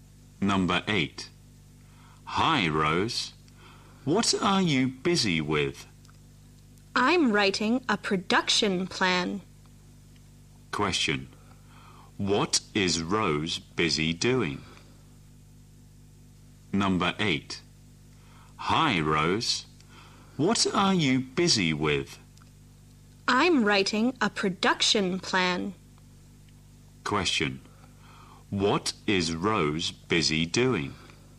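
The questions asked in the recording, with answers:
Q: What is Rose busy doing?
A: Writing a production plan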